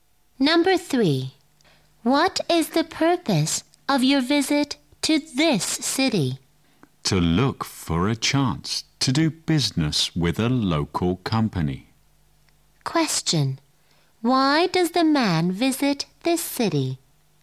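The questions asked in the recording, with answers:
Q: Why does the man visit this city?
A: To look for a chance to do business with a local company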